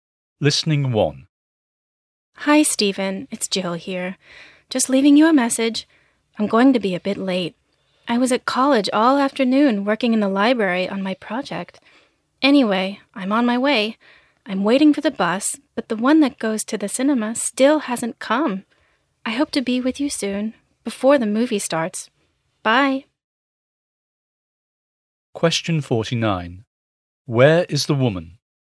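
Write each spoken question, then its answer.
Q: Where is the woman?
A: At the bus stop, waiting for the bus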